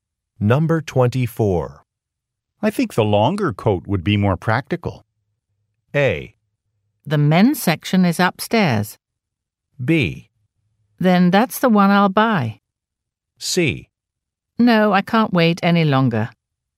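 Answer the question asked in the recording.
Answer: B: Then that's the one I'll buy.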